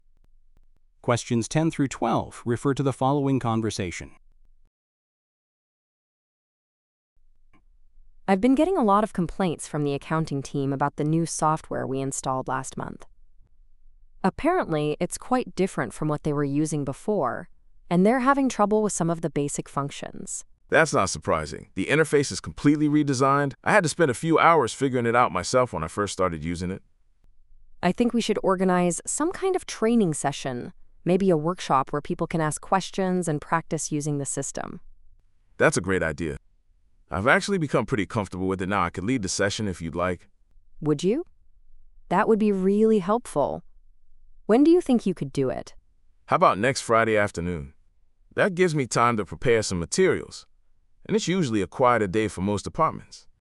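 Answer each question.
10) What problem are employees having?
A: Difficulty using new software

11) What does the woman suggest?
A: Organizing a training workshop

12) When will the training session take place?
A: Friday afternoon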